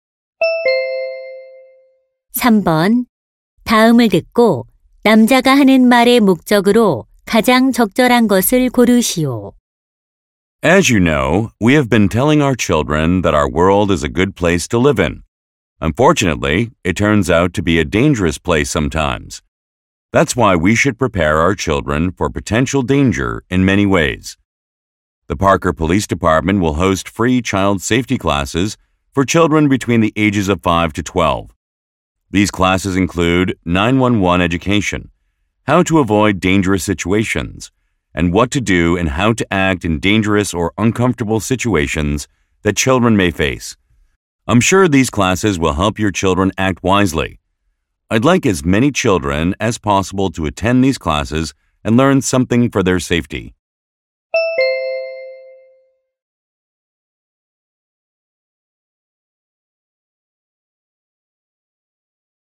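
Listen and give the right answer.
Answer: 무료 어린이 안전 교실 참여를 권장하려고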